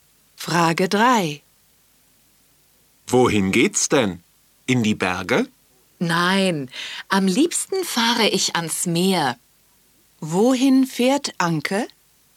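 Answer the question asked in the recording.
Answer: Ans Meer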